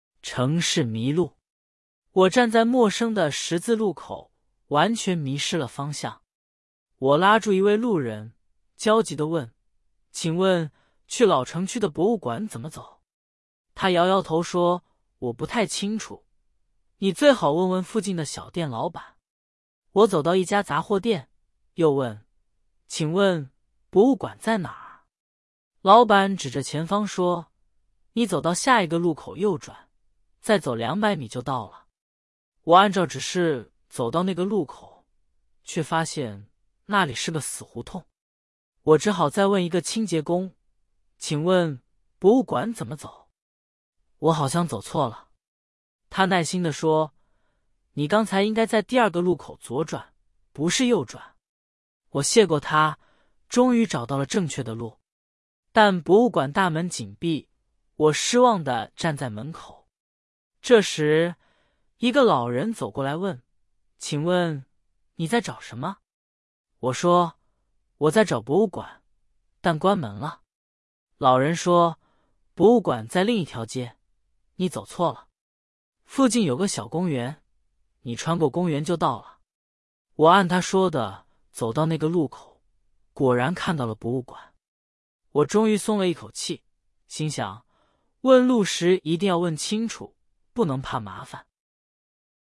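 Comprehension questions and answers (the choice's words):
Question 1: 故事中的主人公在找什么?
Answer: 老城区的博物馆

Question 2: 第一个路人为什么没有帮助主人公?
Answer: 他不太清楚怎么走

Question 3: 杂货店老板告诉主人公怎么走?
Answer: 走到下一个路口右转,再走两百米

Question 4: 主人公按照杂货店老板的指示走到了哪里?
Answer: 一个死胡同

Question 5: 清洁工告诉主人公应该在哪个路口左转?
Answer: 第二个路口

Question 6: 老人告诉主人公怎么去博物馆?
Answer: 穿过附近的小公园

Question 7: 主人公一开始站在什么地方?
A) 公园门口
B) 十字路口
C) 博物馆门口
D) 杂货店门口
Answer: 十字路口

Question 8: 主人公问了几个人才找到博物馆?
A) 一个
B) 两个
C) 三个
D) 四个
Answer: 四个

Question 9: 杂货店老板让主人公在下一个路口怎么走?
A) 左转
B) 右转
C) 直走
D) 掉头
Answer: 右转

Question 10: 清洁工说主人公应该在哪个路口左转?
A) 第一个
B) 第二个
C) 第三个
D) 第四个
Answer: 第二个

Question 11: 老人说博物馆在哪儿?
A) 在公园里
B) 在另一条街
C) 在杂货店旁边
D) 在死胡同里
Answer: 在另一条街

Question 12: 主人公最后的心情是什么?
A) 生气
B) 失望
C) 松了一口气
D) 着急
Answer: 松了一口气

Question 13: 主人公一开始就知道博物馆在哪儿。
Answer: 错

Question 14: 第一个路人告诉了主人公正确的路。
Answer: 错

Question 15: 杂货店老板的指示是正确的。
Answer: 错

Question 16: 清洁工很耐心地帮助了主人公。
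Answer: 对

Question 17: 老人告诉主人公穿过公园去博物馆。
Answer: 对

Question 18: 主人公最后没有找到博物馆。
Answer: 错

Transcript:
城市迷路
我站在陌生的十字路口,完全迷失了方向。我拉住一位路人,焦急地问:"请问,去老城区的博物馆怎么走?"他摇摇头说:"我不太清楚,你最好问问附近的小店老板。"我走到一家杂货店,又问:"请问,博物馆在哪儿?"老板指着前方说:"你走到下一个路口右转,再走两百米就到了。
我按照指示走到那个路口,却发现那里是个死胡同。我只好再问一个清洁工:"请问,博物馆怎么走?我好像走错了。"他耐心地说:"你刚才应该在第二个路口左转,不是右转。"我谢过他,终于找到了正确的路。但博物馆大门紧闭,我失望地站在门口。
这时,一个老人走过来问:"请问,你在找什么?"我说:"我在找博物馆,但关门了。"老人说:"博物馆在另一条街,你走错了。附近有个小公园,你穿过公园就到了。"我按他说的走到那个路口,果然看到了博物馆。我终于松了一口气,心想:问路时一定要问清楚,不能怕麻烦。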